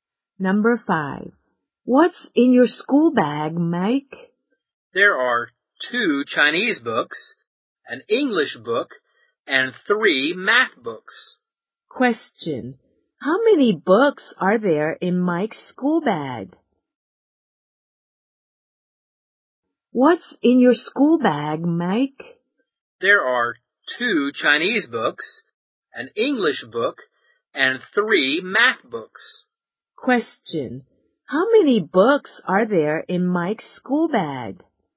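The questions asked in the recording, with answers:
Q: How many books are there in Mike's school bag?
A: Six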